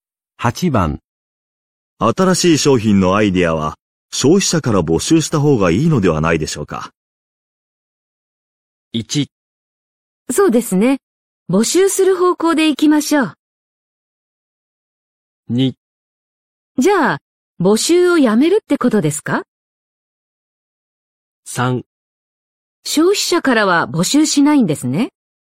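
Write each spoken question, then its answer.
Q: 新しい商品のアイデアは消費者から募集した方がいいのではないでしょうか。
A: 1: そうですね。募集する方向で行きましょう。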